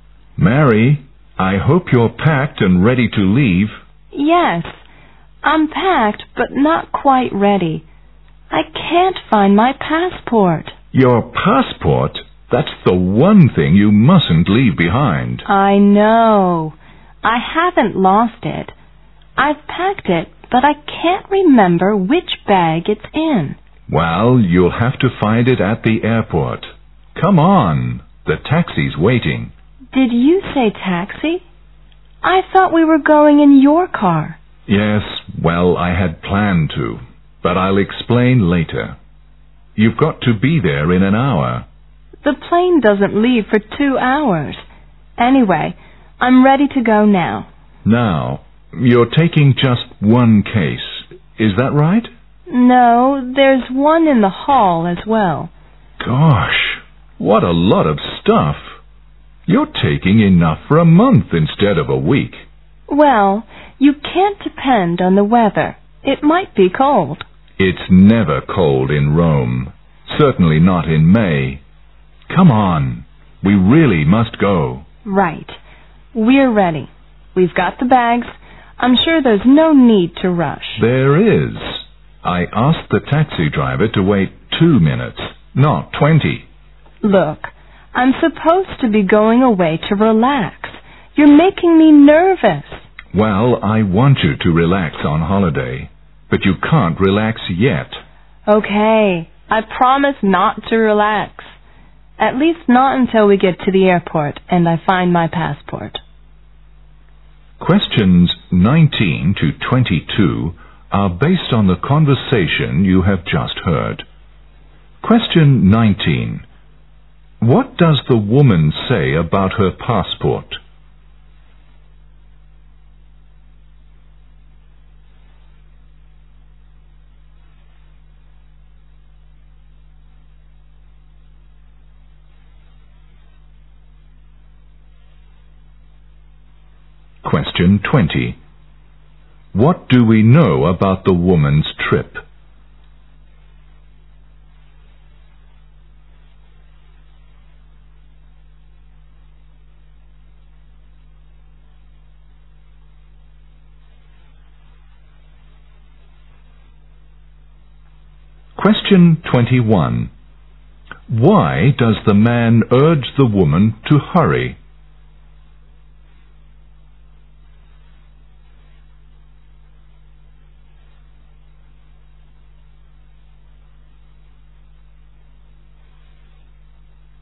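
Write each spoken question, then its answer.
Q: What does the woman say about her passport?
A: She packed it but can't remember which bag it's in

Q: What do we know about the woman's trip?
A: She is going to Rome for a week

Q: Why does the man urge the woman to hurry?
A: The taxi is waiting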